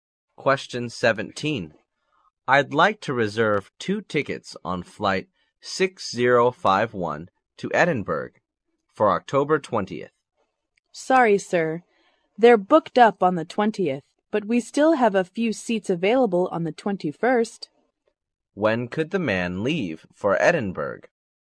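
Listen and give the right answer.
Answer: On October 21st.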